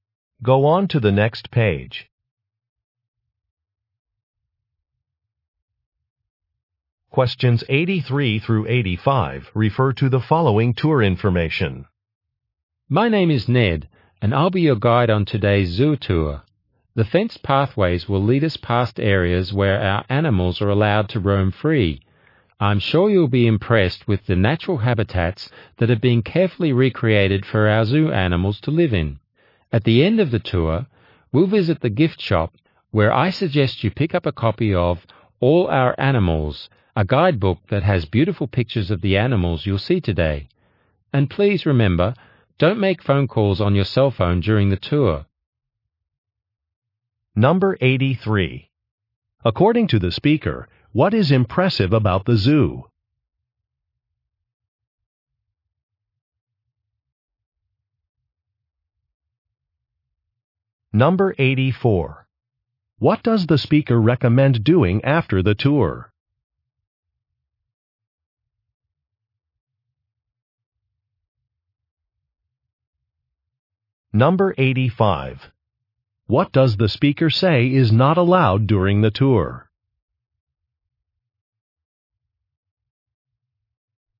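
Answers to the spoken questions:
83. Its recreated natural habitats
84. Buying a guidebook at the gift shop
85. Making phone calls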